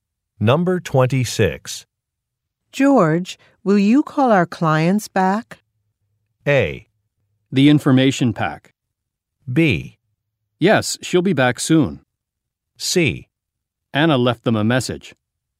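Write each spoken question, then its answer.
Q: George, will you call our clients back?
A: C: Anna left them a message.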